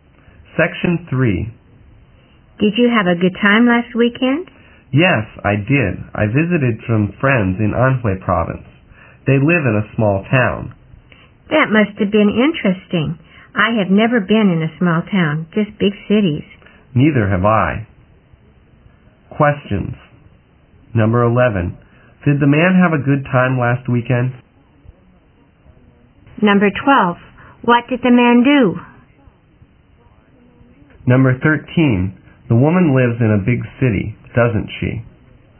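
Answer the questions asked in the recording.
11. Yes, he did.
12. He visited some friends in Anhui province.
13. Yes, she does.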